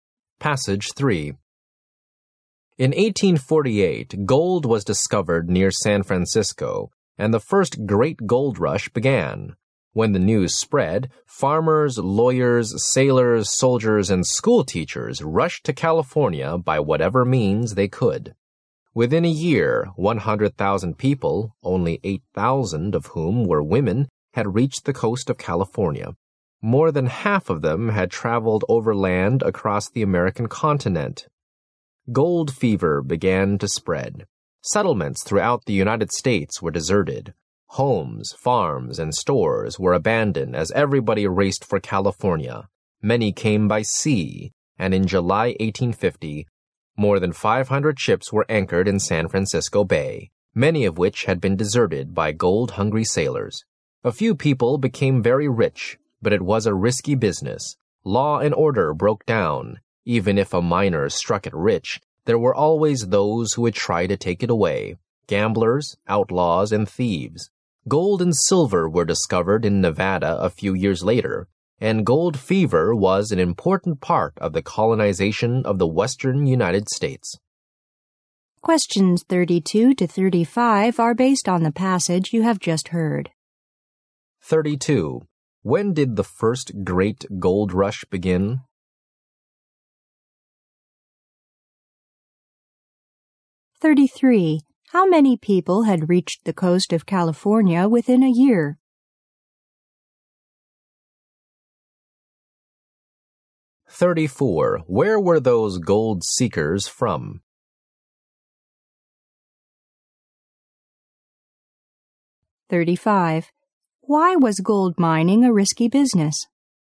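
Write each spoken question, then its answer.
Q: When did the first great gold rush begin?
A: In 1848

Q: How many people had reached the coast of California within a year?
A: 100,000

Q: Why was gold mining a risky business?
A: Law and order broke down, and others tried to steal the gold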